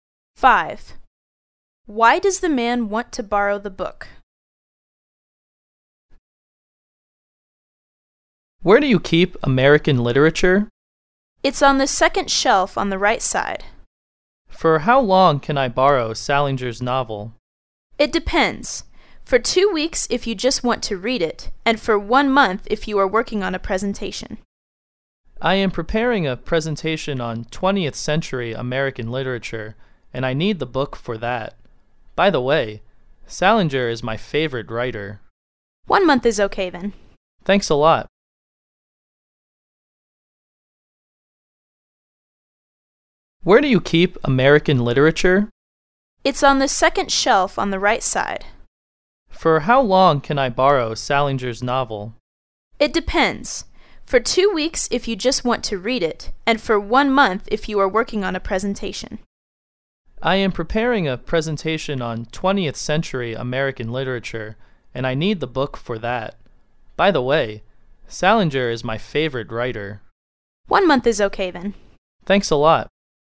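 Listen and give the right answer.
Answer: He is preparing a presentation on 20th century American literature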